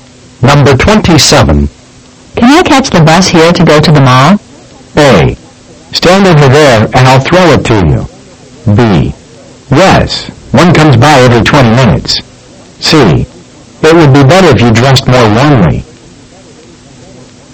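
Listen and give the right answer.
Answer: B: Yes, one comes by every 20 minutes.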